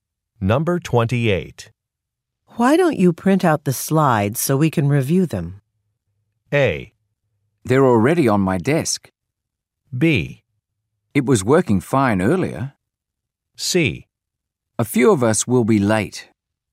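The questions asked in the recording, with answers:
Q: Why don't you print out the slides so we can review them?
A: A: They're already on my desk.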